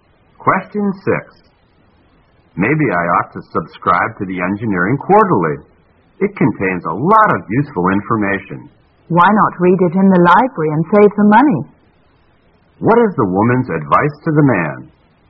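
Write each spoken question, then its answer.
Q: What is the woman's advice to the man?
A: Read the Engineering Quarterly in the library to save money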